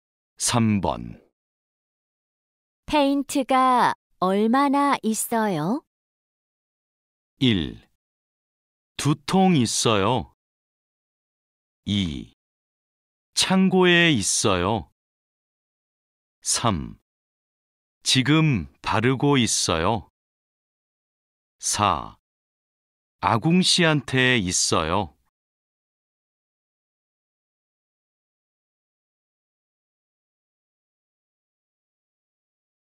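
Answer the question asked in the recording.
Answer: 1: 두 통 있어요.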